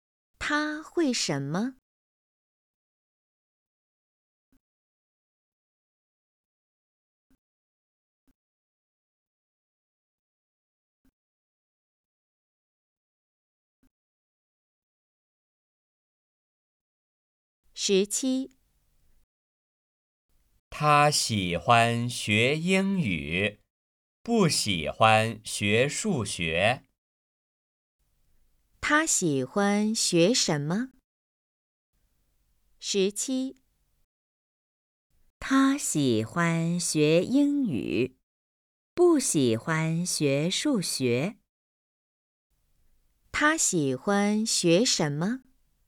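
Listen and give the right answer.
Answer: 英语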